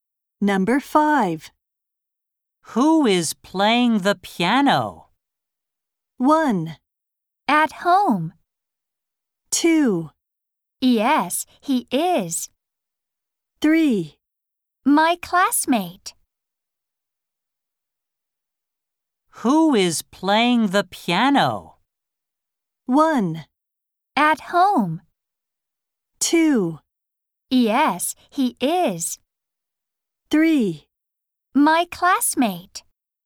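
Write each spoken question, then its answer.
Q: Who is playing the piano?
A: 3: My classmate.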